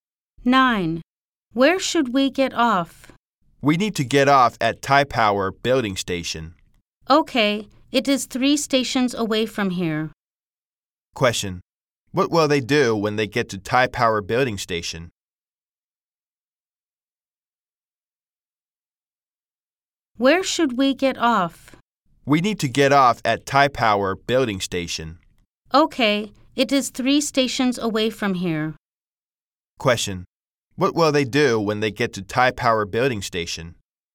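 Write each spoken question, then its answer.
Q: Question. What will they do when they get to Thai Power Building Station?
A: Get off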